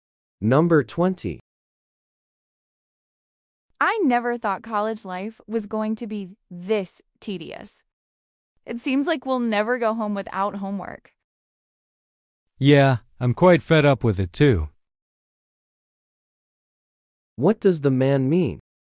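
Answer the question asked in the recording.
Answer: He is also tired of the homework.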